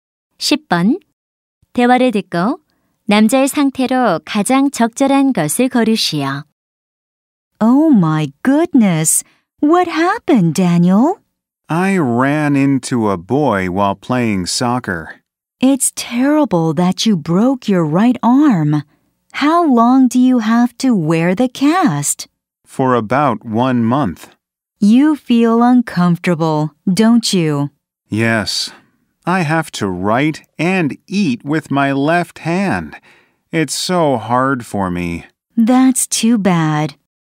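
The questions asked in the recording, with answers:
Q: 대화를 듣고 남자의 상태로 가장 적절한 것을 고르시오.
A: 오른팔이 부러짐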